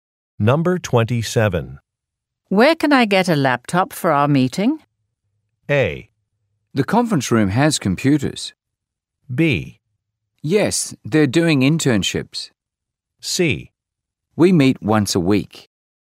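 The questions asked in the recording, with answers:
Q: Where can I get a laptop for our meeting?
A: A: The conference room has computers.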